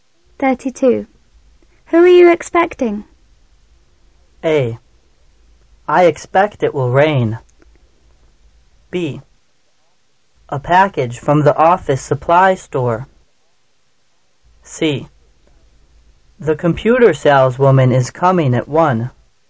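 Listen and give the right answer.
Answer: C: The computer saleswoman is coming at 1.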